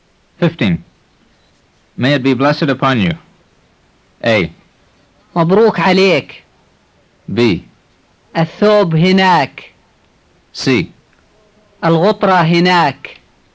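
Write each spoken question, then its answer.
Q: May it be blessed upon you.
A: A: مبروك عليك.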